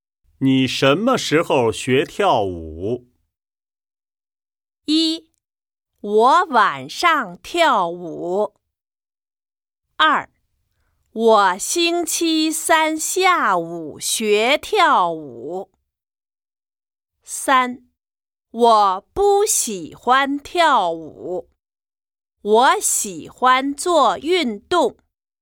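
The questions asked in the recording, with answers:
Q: 你什么时候学跳舞?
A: 二: 我星期三下午学跳舞。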